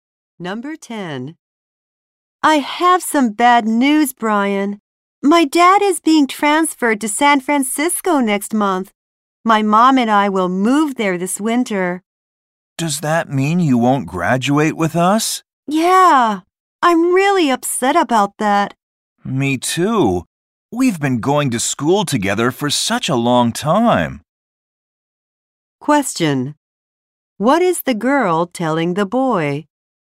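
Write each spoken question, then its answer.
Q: What is the girl telling the boy?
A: She is moving to San Francisco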